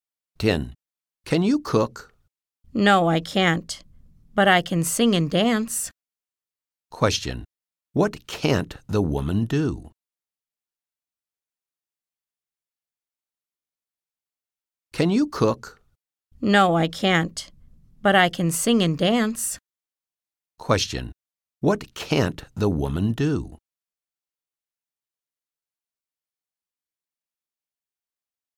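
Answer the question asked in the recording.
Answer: Cook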